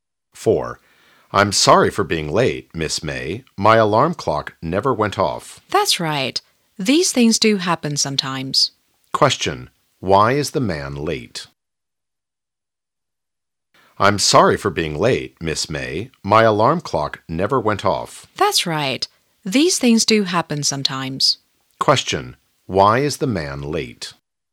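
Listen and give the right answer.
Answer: His alarm clock didn't go off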